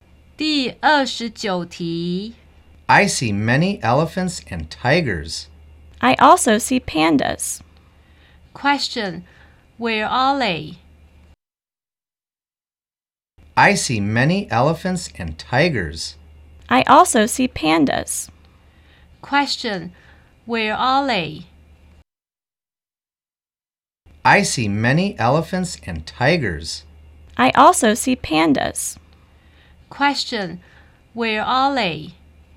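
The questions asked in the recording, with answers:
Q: Question, where are they?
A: At the zoo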